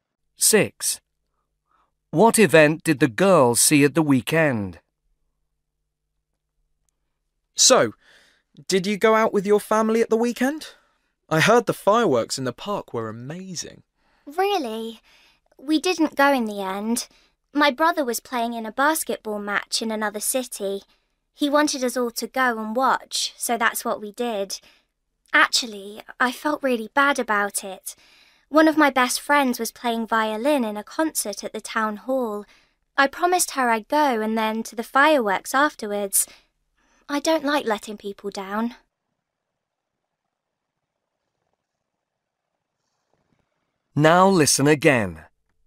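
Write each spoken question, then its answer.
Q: What event did the girl see at the weekend?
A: A basketball match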